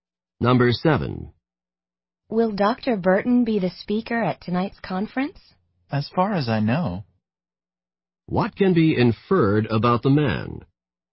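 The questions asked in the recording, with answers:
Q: What can be inferred about the man?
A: He believes Dr. Burton will speak, but he isn't completely sure.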